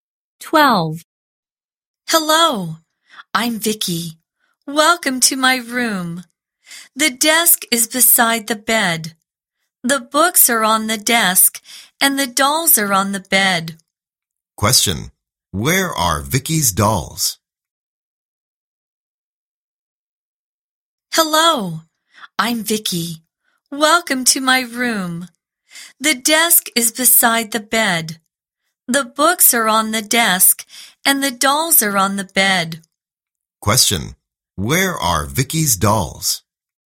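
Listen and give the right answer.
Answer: On the bed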